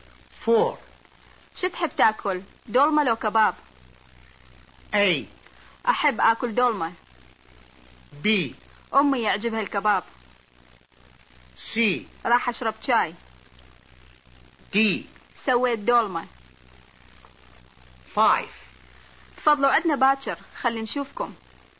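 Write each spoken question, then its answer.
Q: شو تحب تأكل دولمة لو كباب؟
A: A: أحب أكل دولمة.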